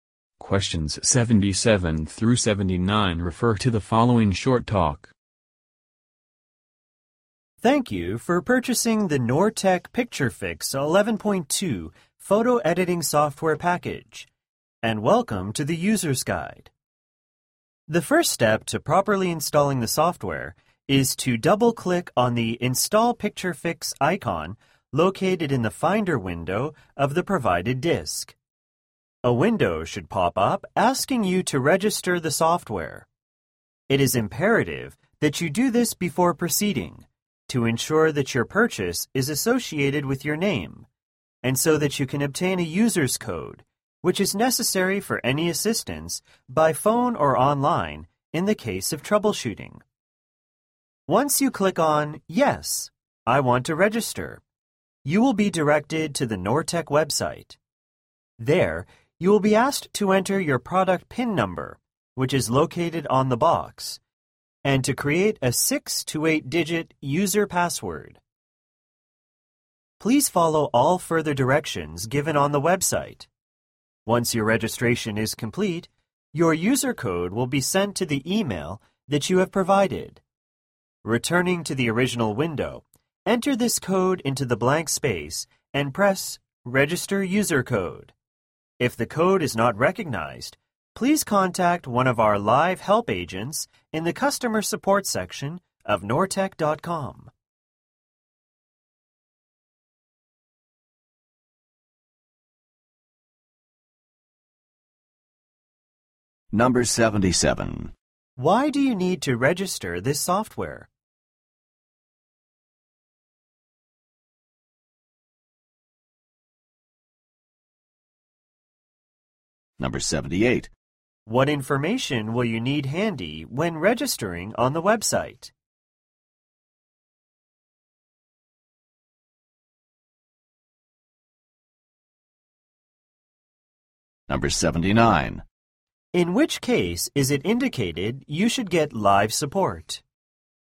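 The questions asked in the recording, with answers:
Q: Why do you need to register this software?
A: To get a user's code needed for support

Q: What information will you need handy when registering on the website?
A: The product PIN number on the box

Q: In which case is it indicated you should get live support?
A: If the user code is not recognized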